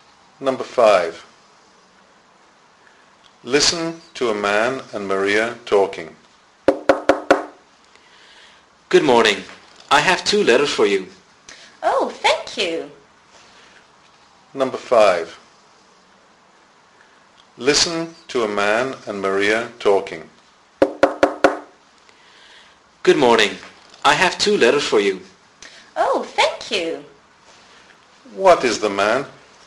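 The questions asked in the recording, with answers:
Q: What is the man?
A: A postman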